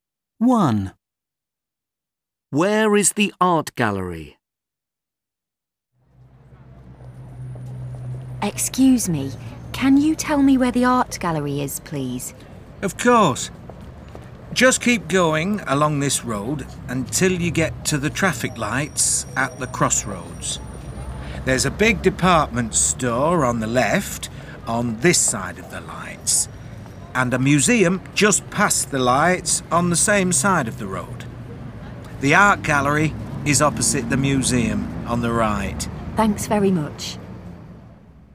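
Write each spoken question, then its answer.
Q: Where is the art gallery?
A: Opposite the museum, on the right past the traffic lights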